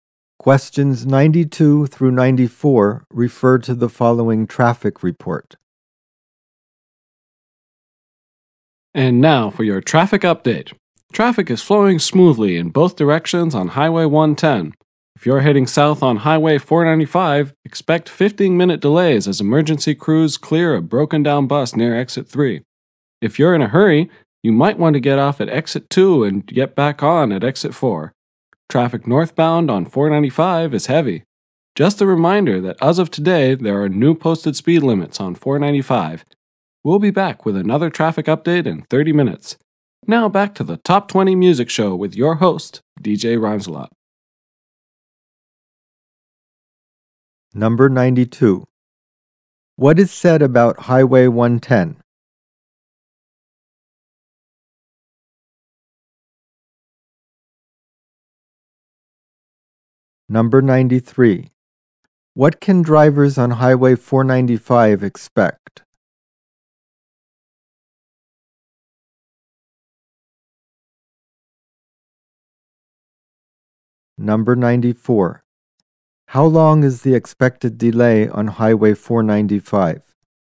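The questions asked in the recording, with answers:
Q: What is said about Highway 110?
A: Traffic is flowing smoothly in both directions.

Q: How long is the expected delay on Highway 495?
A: 15 minutes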